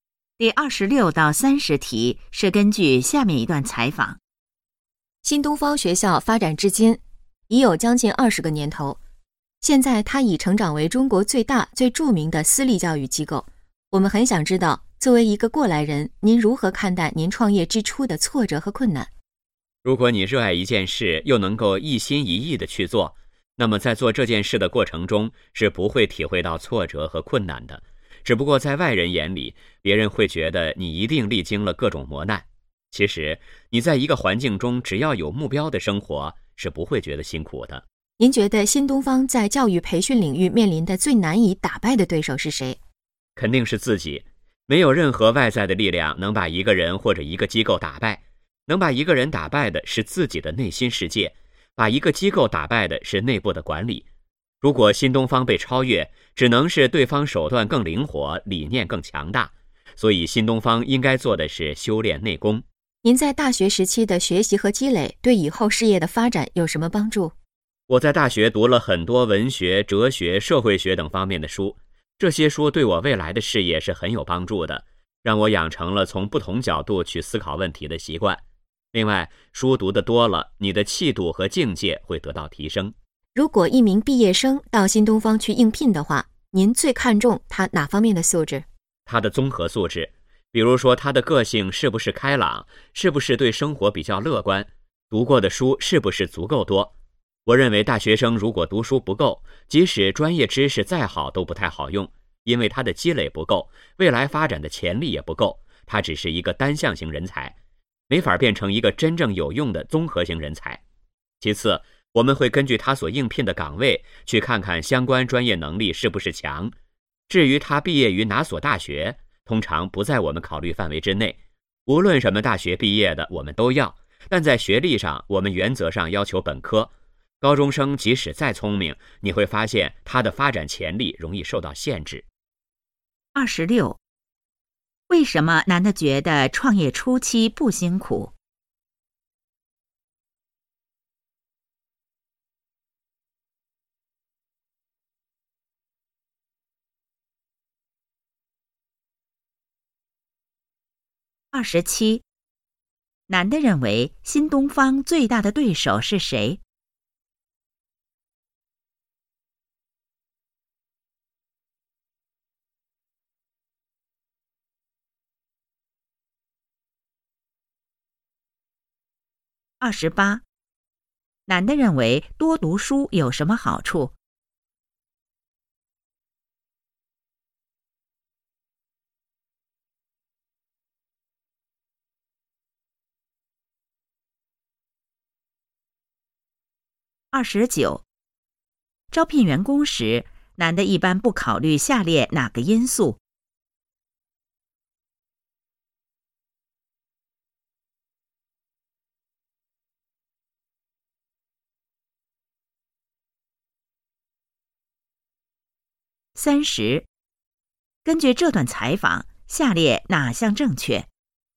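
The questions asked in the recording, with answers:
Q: 为什么男的觉得创业初期不辛苦?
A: 热爱并一心一意去做,有目标

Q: 男的认为新东方最大的对手是谁?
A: 自己

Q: 男的认为多读书有什么好处?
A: 养成从不同角度思考问题的习惯,提升气度和境界

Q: 招聘员工时,男的一般不考虑下列哪个因素?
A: 毕业于哪所大学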